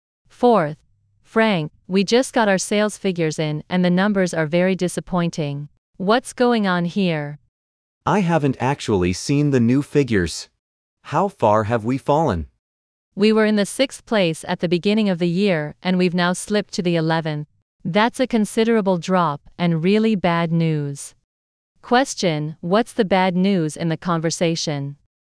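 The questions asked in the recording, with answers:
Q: what's the bad news in the conversation?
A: Their sales ranking has dropped from 6th to 11th place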